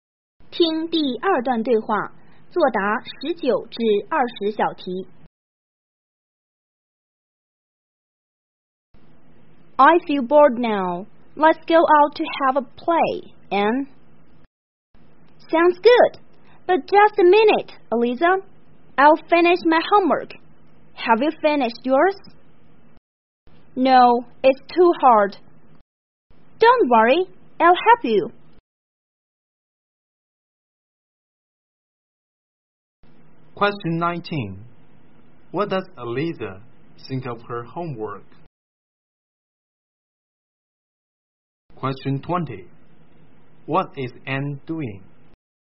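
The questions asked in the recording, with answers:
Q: What does Eliza think of her homework?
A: It's too hard

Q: What is Anne doing?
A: Finishing her homework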